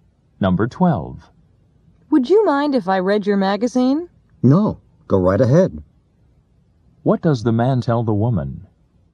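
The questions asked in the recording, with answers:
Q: What does the man tell the woman?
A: She may read his magazine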